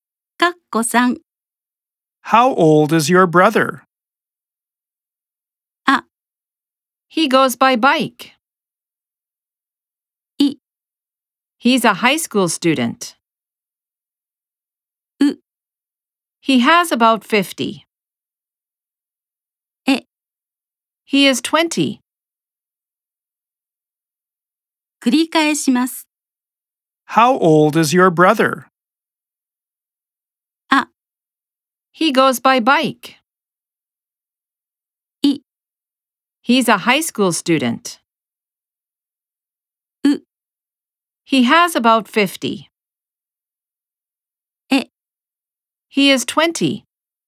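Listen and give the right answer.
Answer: E: He is 20.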